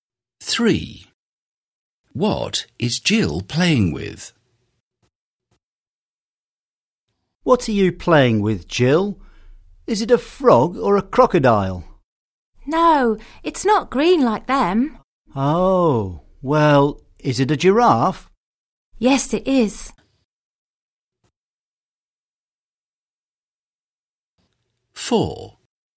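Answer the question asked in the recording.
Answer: a giraffe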